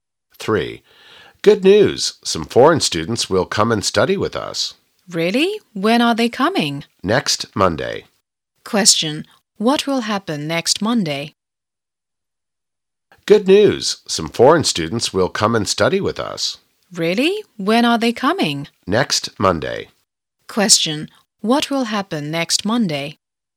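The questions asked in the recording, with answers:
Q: what will happen next Monday?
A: Some foreign students will come and study with them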